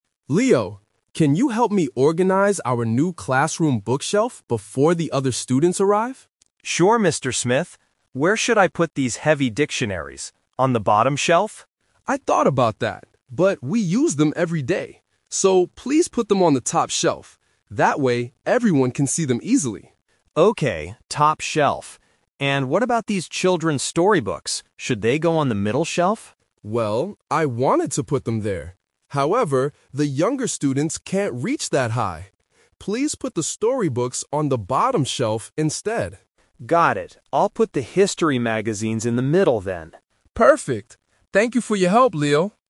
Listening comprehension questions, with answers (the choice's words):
Listen to a teacher and a student organizing a bookshelf. Choose the correct answer A, B, or C.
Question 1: Where will Leo put the dictionaries?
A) On the top shelf.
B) On the middle shelf.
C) On the bottom shelf.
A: On the top shelf.

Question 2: Why does Mr. Smith want the storybooks on the bottom shelf?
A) Because they are very heavy.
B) Because younger students need to reach them.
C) Because the middle shelf is full.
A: Because younger students need to reach them.

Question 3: What will they put on the middle shelf?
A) Children's storybooks.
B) Heavy dictionaries.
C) History magazines.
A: History magazines.

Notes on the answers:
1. Mr. Smith clearly says, "please put them on the top shelf." Trap: Option C is a trap. Leo asks if he should put them on the bottom shelf, but the teacher says no.
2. Mr. Smith explains that "the younger students can't reach that high" so the books must go on the bottom shelf. Trap: Option A is a trap because the word "heavy" is used to describe the dictionaries at the beginning of the audio, not the storybooks. Option C is not mentioned.
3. At the end of the conversation, Leo says, "I'll put the history magazines in the middle, then" and the teacher agrees ("Perfect"). Trap: Option A is a trap because the teacher originally "wanted to put them there" (the storybooks on the middle shelf), but changed his mind using the word "However".

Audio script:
Mr. Smith: Leo, can you help me organize our new classroom bookshelf before the other students arrive?
Leo: Sure, Mr. Smith. Where should I put these heavy dictionaries?
Mr. Smith: I thought about that, but we use them every day. So, please put them on the top shelf. That way, everyone can see them easily.
Leo: Okay, top shelf. And what about these children's storybooks? Should they go on the middle shelf?
Mr. Smith: Well, I wanted to put them there. However, the younger students can't reach that high. Please put the storybooks on the bottom shelf instead.
Leo: Got it. I'll put the history magazines in the middle, then.